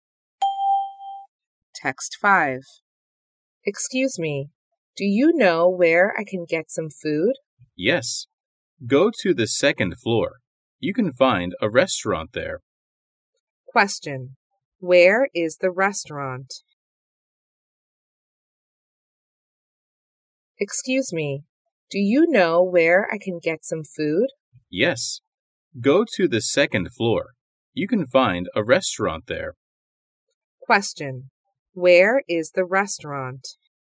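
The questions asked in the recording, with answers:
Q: Where is the restaurant?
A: On the second floor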